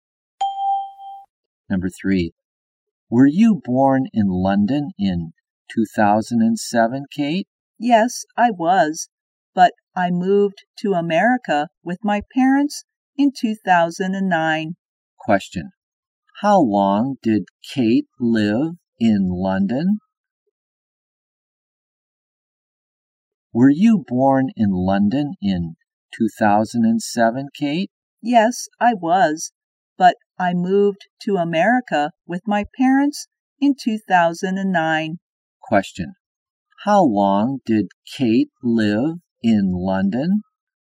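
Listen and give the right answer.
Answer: For two years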